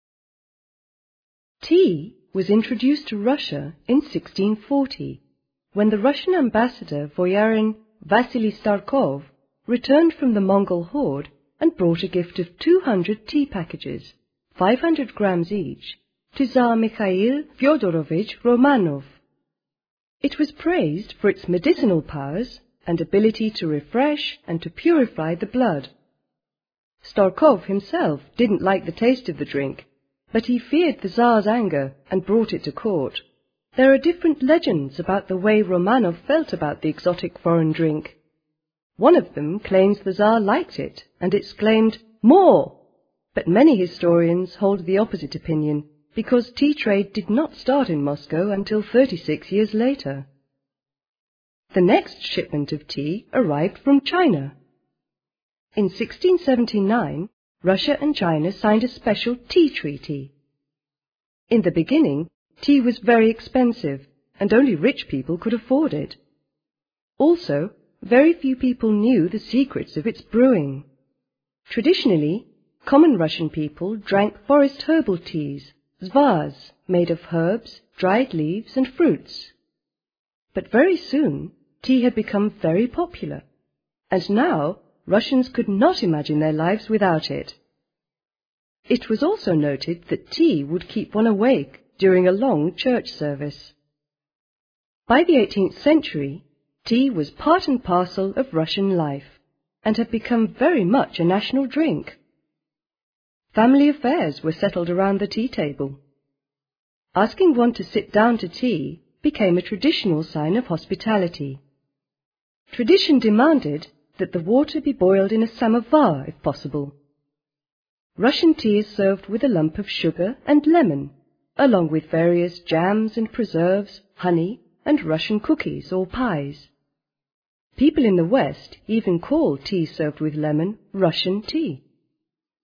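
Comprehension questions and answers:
Read the statements and listen to the first part of the text. Decide which sentences are True,Not Stated or False ,according to the text. You can only listen to the recording TWICE. You cannot pause, rewind, forward, or download.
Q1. Tea was first brought to Russia from China.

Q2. Tea was known as a strong remedy before it was brought to Russia.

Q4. Mikhail Fedorovich held regular assemblies of court in order to make the nobles get used to drinking tea.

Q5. Russia started importing tea from China in the 18th century.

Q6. At first tea cost a lot of money.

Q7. Drinking tea helps one to fall asleep.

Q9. Russian tea is served with sugar.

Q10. The modern tradition has replaced the traditional sign of hospitality with coffee.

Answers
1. False
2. True
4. Not stated
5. False
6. True
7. False
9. True
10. Not stated

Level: 9 «Б»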